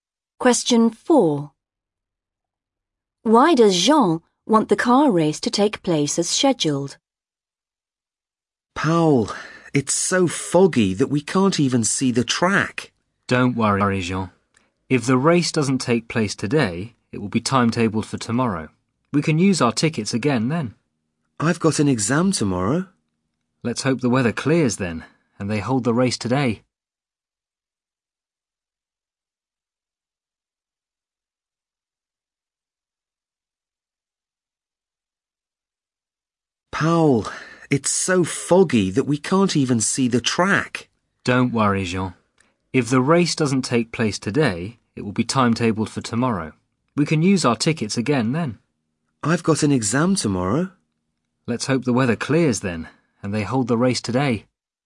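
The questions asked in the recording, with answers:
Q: Why does Jean want the car race to take place as scheduled?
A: She has an exam tomorrow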